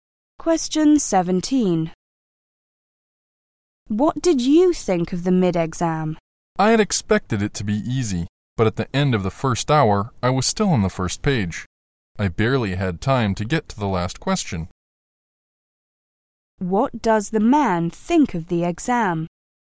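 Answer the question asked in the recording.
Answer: It was harder and longer than he expected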